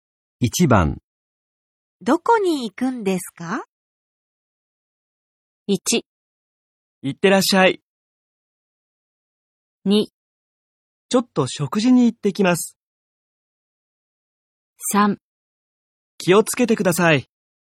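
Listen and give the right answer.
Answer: 2: ちょっと食事に行ってきます。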